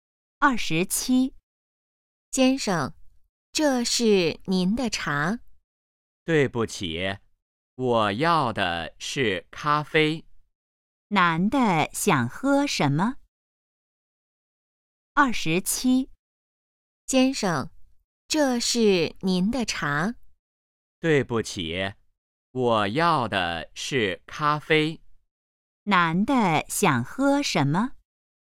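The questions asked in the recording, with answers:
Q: 男的想喝什么?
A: 咖啡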